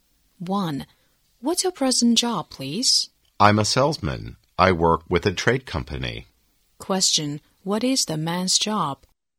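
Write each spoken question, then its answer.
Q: What is the man's job?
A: A salesman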